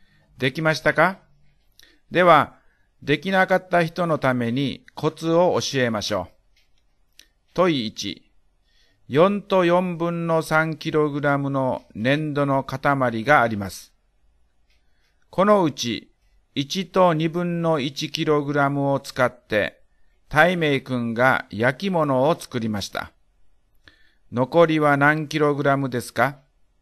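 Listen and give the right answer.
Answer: 3と4分の1キログラム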